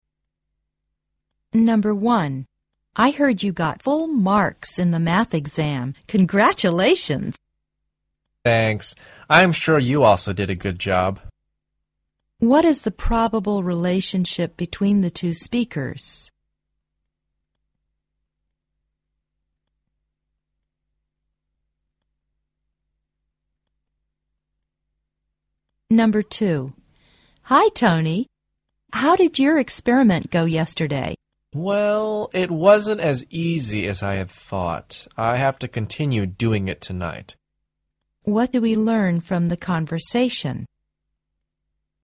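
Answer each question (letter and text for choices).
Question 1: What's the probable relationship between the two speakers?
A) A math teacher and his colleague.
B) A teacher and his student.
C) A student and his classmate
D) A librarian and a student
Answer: C) A student and his classmate

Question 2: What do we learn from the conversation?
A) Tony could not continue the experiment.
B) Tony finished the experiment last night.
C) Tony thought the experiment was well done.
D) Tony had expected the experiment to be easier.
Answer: D) Tony had expected the experiment to be easier.

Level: 四级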